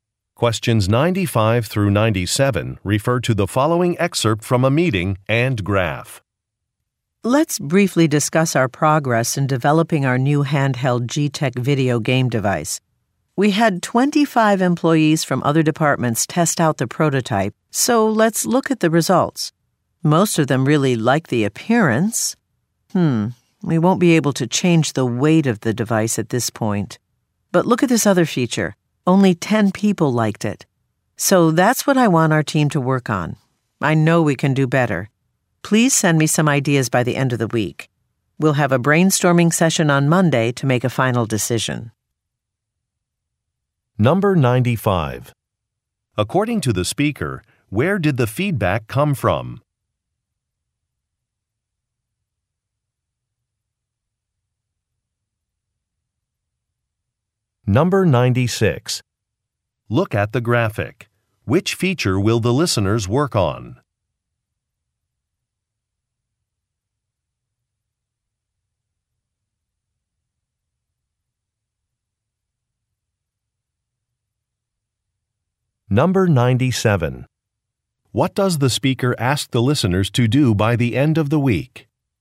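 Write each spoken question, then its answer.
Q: According to the speaker, where did the feedback come from?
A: Employees from other departments

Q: What does the speaker ask the listeners to do by the end of the week?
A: Send ideas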